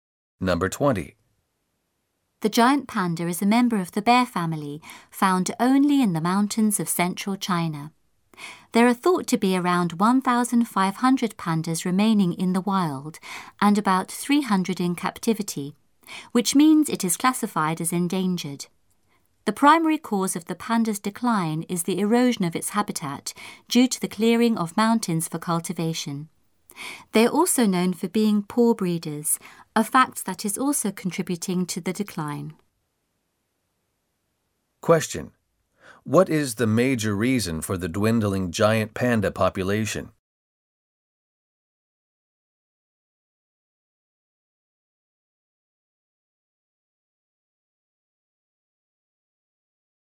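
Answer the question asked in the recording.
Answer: Loss of habitat as mountains are cleared for farming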